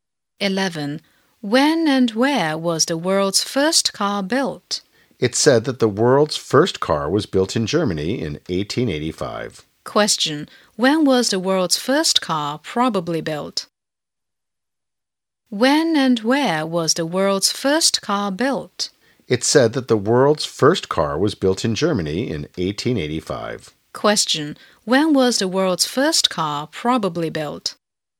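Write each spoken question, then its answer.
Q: When was the world's first car probably built?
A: In 1885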